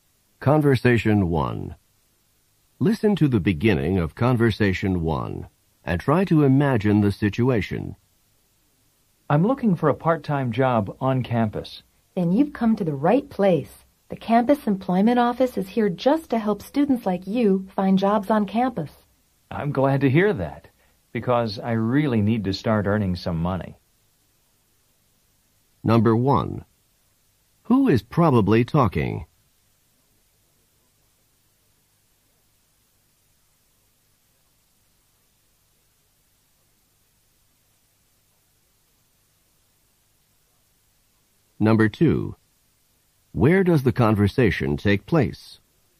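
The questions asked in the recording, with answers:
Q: Who is probably talking?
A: A student and a worker at the campus employment office

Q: Where does the conversation take place?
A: In the campus employment office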